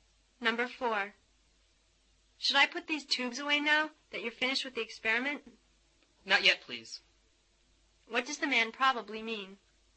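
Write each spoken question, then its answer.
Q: What does the man probably mean?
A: The tubes shouldn't be put away yet.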